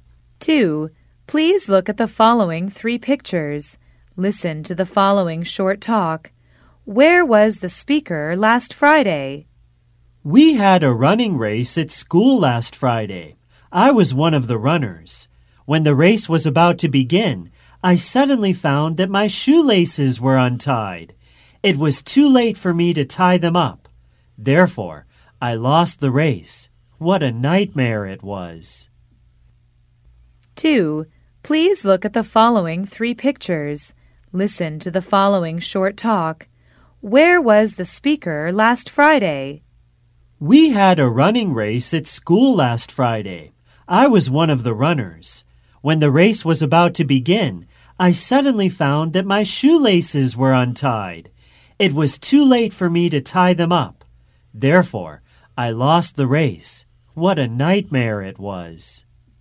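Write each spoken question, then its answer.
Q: Where was the speaker last Friday?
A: At a running race at school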